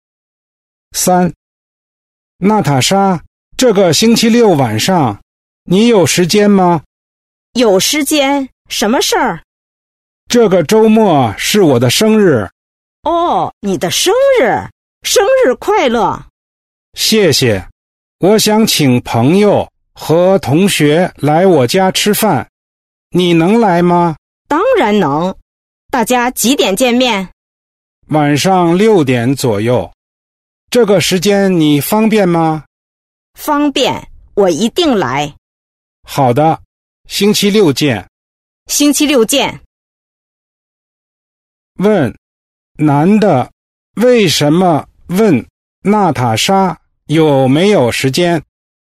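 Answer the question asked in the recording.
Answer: 他想请她星期六晚上来他家吃饭(过生日)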